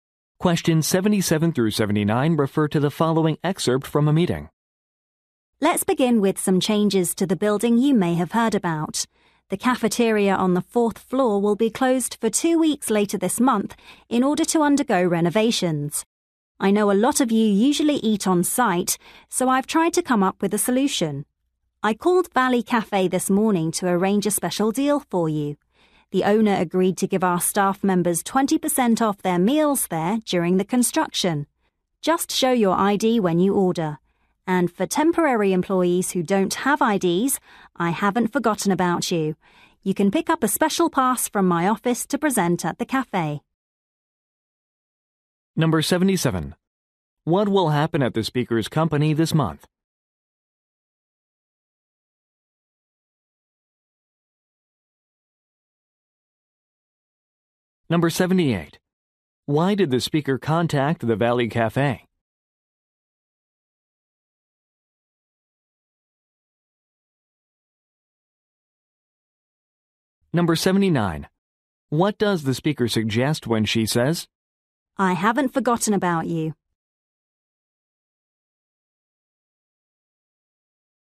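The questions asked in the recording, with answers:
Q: What will happen at the speaker's company this month?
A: The cafeteria will close for renovations

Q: Why did the speaker contact the Valley Cafe?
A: To arrange a discount for staff

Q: I haven't forgotten about you?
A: Temporary employees can also get the discount with a special pass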